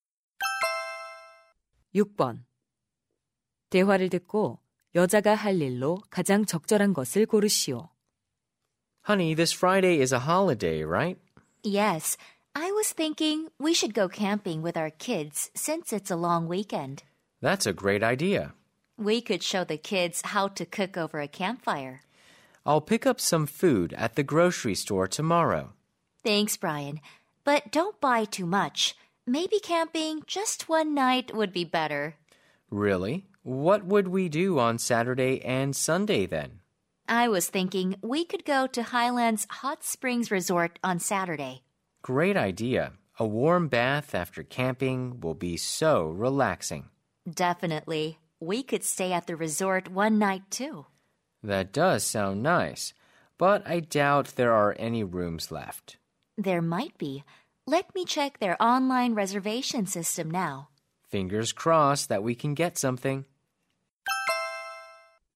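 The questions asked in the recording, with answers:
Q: 대화를 듣고 여자가 할 일로 가장 적절한 것을 고르시오.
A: 온천 리조트 온라인 예약 확인하기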